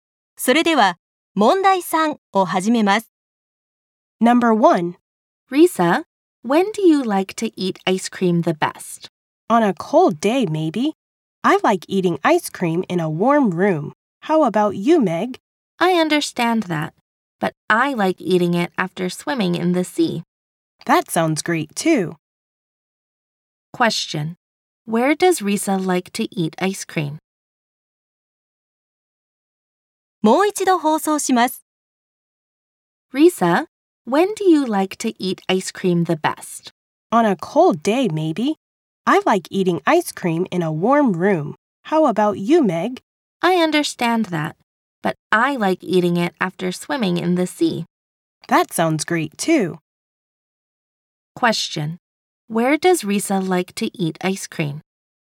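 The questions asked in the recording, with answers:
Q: Where does Risa like to eat ice cream?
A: In a warm room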